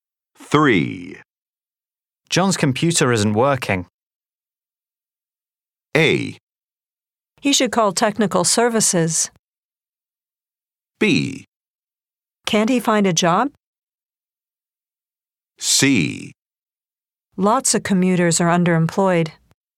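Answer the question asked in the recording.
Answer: A: He should call technical services.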